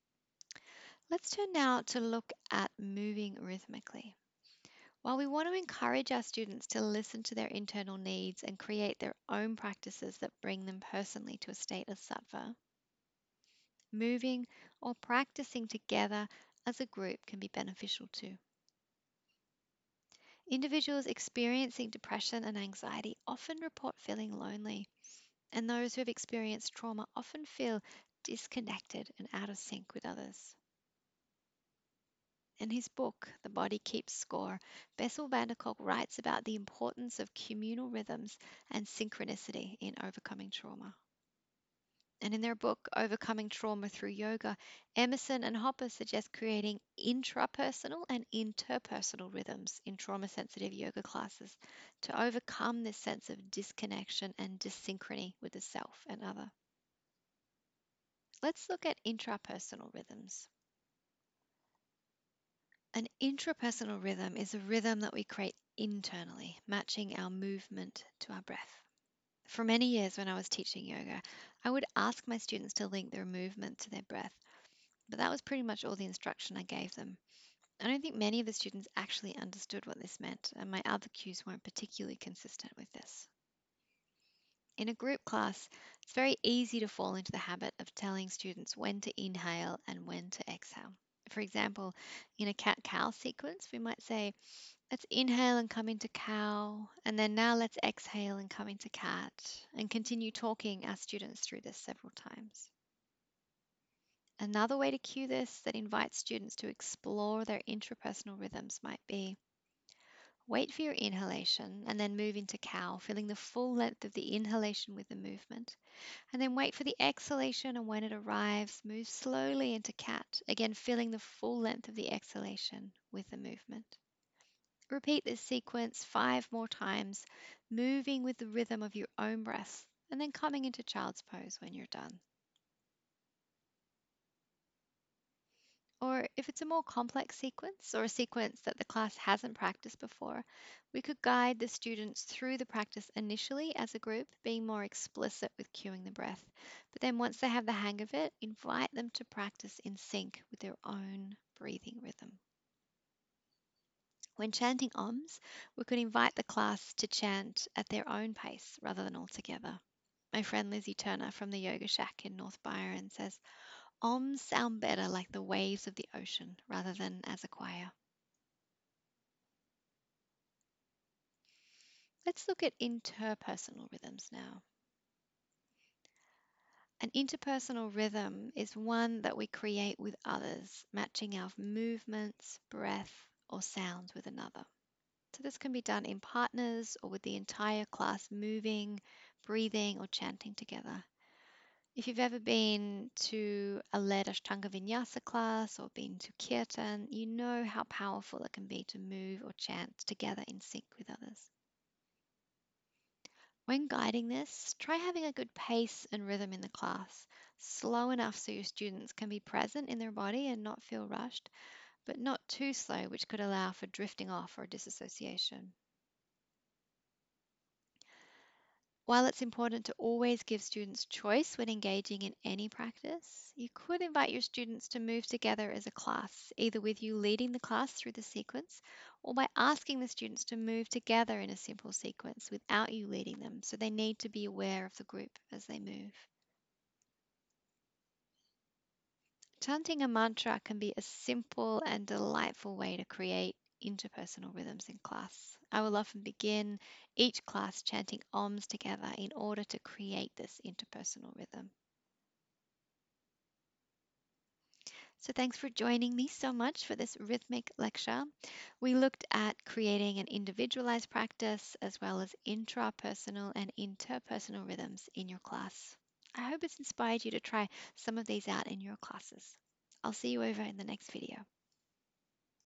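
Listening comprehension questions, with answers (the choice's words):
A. A rhythm that we create internally, matching our movement to our breath.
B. A rhythm that we create with others, matching our movements, breath or sound with another.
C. A rhythm that comes from practicing with music.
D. None of the above.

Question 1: What is an interpersonal rhythm?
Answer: A rhythm that we create with others, matching our movements, breath or sound with another.

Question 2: What is an intrapersonal rhythm?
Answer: A rhythm that we create internally, matching our movement to our breath.

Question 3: How could we support our students to create an intrapersonal rhythm in a group class?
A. Invite students to move with the rhythm of their own breath.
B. Invite students to chants Oms at their own pace, rather than all together in the class (like waves of the ocean, rather than a choir).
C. Initially guide students through the practice together as a group, being more explicit with cueing the timing of the breath, then invite them to practice in sync with their own breathing rhythm.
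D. All of the above.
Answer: All of the above.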